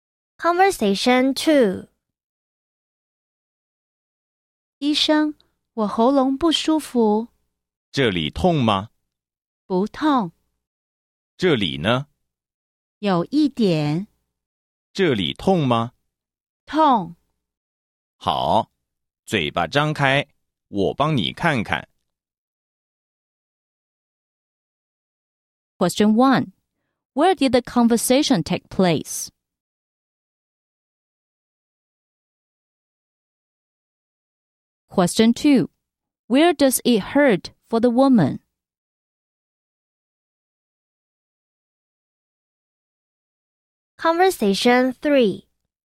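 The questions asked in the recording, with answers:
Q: Where did the conversation take place?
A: At the doctor's office

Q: Where does it hurt for the woman?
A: Her throat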